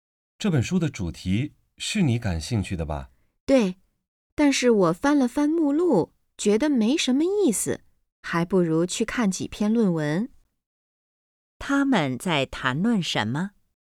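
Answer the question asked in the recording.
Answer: 一本书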